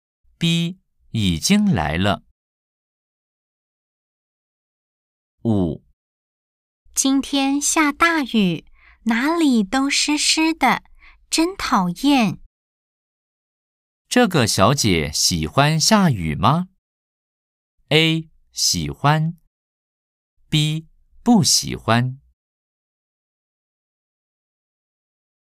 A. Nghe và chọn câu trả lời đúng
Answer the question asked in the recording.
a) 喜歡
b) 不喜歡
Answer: b) 不喜歡

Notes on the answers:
今天下大雨,哪裡都濕濕的,真討厭!